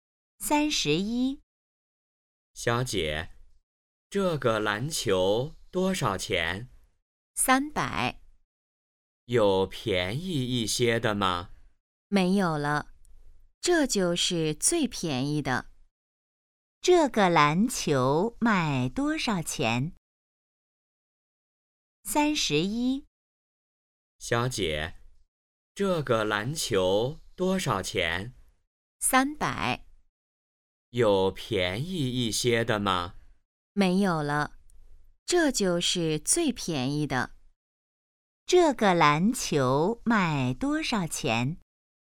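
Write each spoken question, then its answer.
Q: 这个篮球卖多少钱?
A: 300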